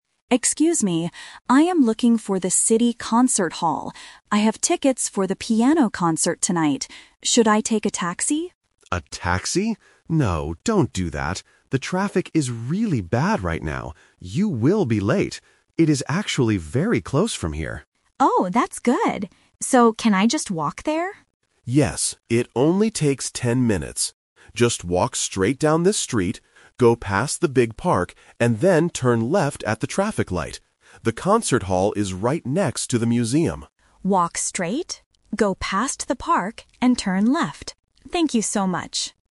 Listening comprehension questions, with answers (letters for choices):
Listen to the conversation between a tourist and a man on the street. Choose the correct answer (A, B, or C) for each question.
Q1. Why does the man tell the woman NOT to take a taxi?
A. Because it costs too much money.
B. Because she cannot find a taxi here.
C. Because the traffic is very bad.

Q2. How will the woman travel to the Concert Hall?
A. By bus.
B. On foot.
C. By taxi.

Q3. Where is the City Concert Hall located?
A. Inside the big park.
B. Next to the museum.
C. At the traffic light.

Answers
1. C
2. B
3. B

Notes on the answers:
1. The man says clearly, "The traffic is really bad right now. You will be late." Option (A) is a plausible reason for tourists in real life, but it is not mentioned in the audio. Option (B) is also a logical guess but is never stated.
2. The woman asks, "can I just walk there?" and the man agrees ("Yes, it only takes ten minutes"). "On foot" is a synonym for walking. Option (C) is the A2 Twist/Trap; she wanted to take a taxi at first, but the man told her not to. Option (A) is an unmentioned distractor.
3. The man gives the exact location at the end: "The Concert Hall is right next to the museum." Option (A) is a trap because the park is mentioned ("go past the big park"), but the hall is not inside it. Option (C) is a trap because she needs to turn left at the traffic light, but that is not the final location of the building.

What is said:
Woman: Excuse me, I am looking for the City Concert Hall. I have tickets for the piano concert tonight. Should I take a taxi?
Man: A taxi? No, don't do that. The traffic is really bad right now. You will be late. It is actually very close from here.
Woman: Oh, that's good! So, can I just walk there?
Man: Yes, it only takes ten minutes. Just walk straight down this street, go past the big park, and then turn left at the traffic light. The Concert Hall is right next to the museum.
Woman: Walk straight, go past the park, and turn left. Thank you so much!